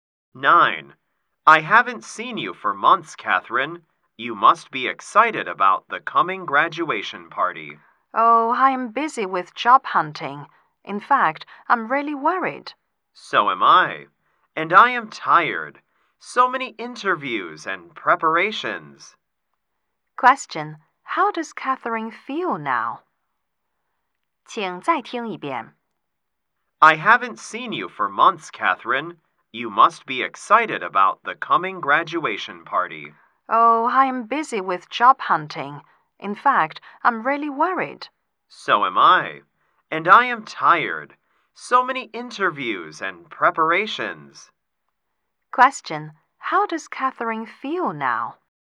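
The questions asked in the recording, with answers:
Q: Question, how does Catherine feel now?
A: Worried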